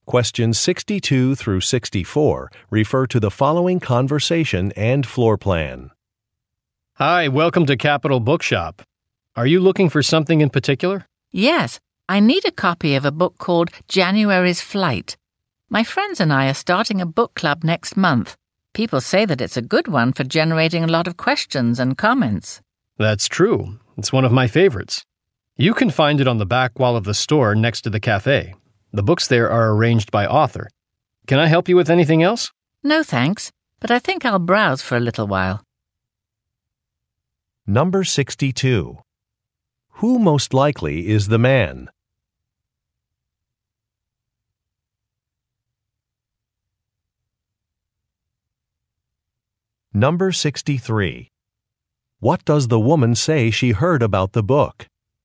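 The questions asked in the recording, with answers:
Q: Who most likely is the man?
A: A bookstore employee

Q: What does the woman say she heard about the book?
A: It is good for generating a lot of questions and comments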